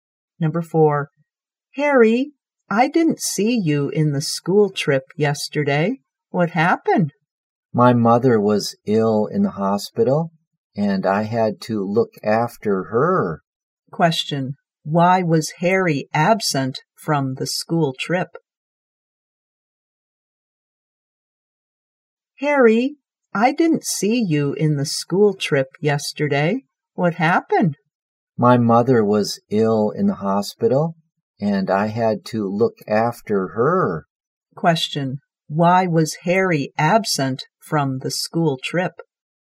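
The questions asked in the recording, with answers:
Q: Question, why was Harry absent from the school trip?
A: He had to look after his sick mother in the hospital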